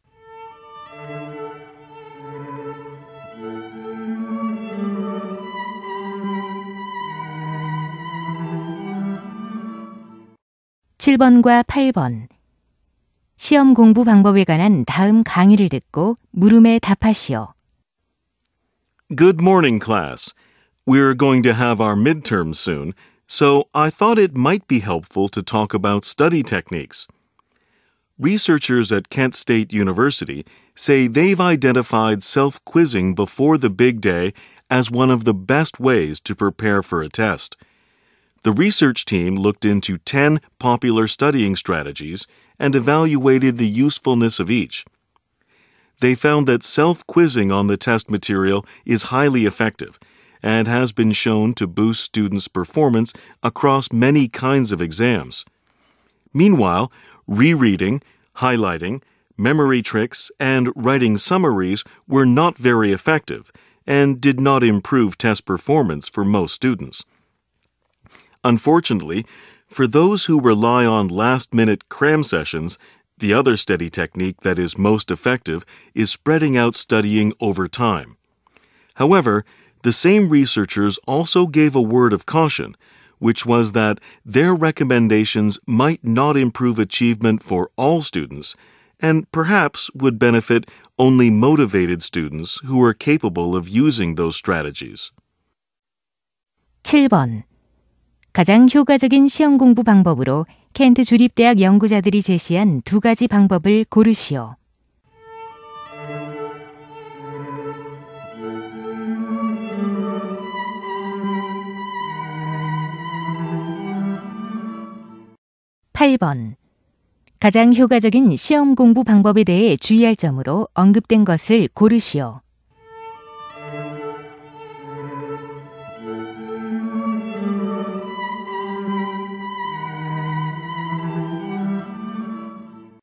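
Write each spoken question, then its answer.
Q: 가장 효과적인 시험 공부 방법으로 켄트 주립대학 연구자들이 제시한 두 가지 방법을 고르시오.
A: 스스로 문제 풀어보기, 시간을 두고 나누어 공부하기

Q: 가장 효과적인 시험 공부 방법에 대해 주의할 점으로 언급된 것을 고르시오.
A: 의욕 있는 학생들에게만 도움이 될 수 있다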